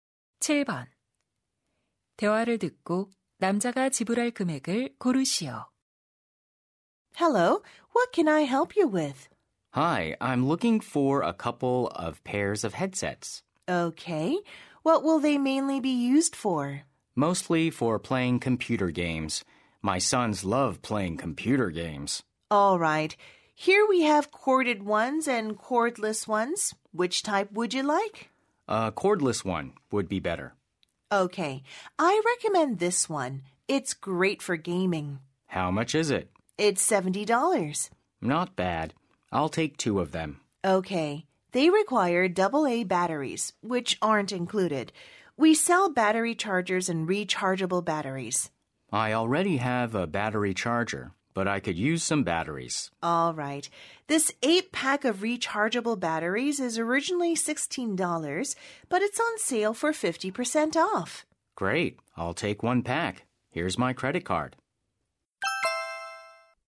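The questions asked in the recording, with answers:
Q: 대화를 듣고 남자가 지불할 금액을 고르시오.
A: $148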